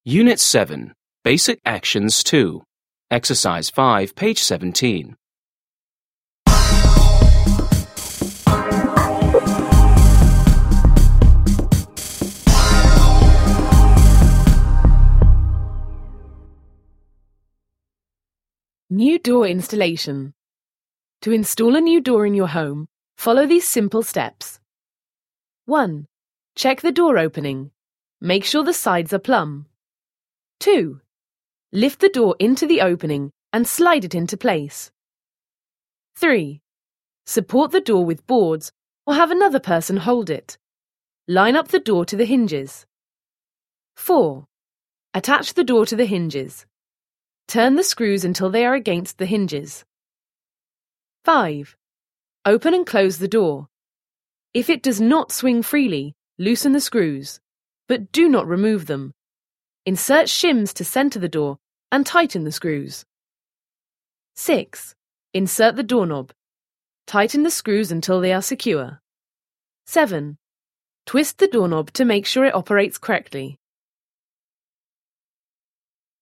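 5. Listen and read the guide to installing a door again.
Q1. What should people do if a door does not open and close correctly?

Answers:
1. Loosen the screws (without removing them), insert shims to center the door and tighten the screws.

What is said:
Unit 7. Basic actions 2.
New Door Installation
To install a new door in your home, follow these simple steps:
1. Check the door opening. Make sure the sides are plumb.
2. Lift the door into the opening and slide it into place.
3. Support the door with boards or have another person hold it. Line up the door to the hinges.
4. Attach the door to the hinges. Turn the screws until they are against the hinges.
5. Open and close the door. If it does not swing freely, loosen the screws. But do not remove them. Insert shims to center the door and tighten the screws.
6. Insert the doorknob. Tighten the screws until they are secure.
7. Twist the doorknob to make sure it operates correctly.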